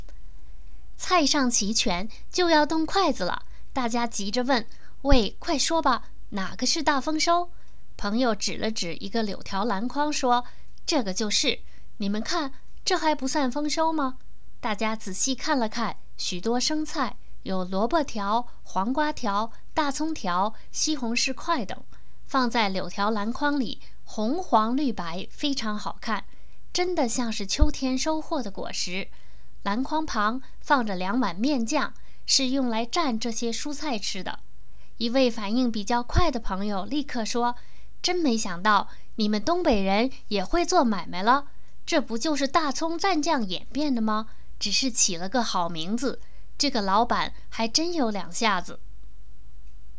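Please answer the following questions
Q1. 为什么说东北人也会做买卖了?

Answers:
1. 因为"大丰收"其实就是大葱蘸酱,只是起了个好名字

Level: 3rd Year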